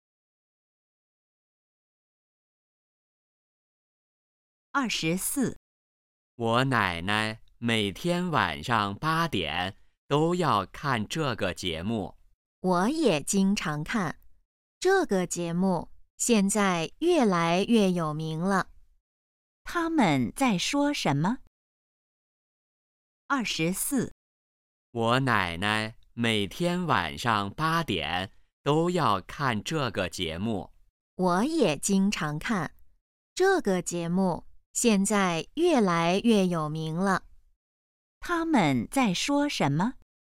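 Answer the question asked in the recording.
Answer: 一个电视节目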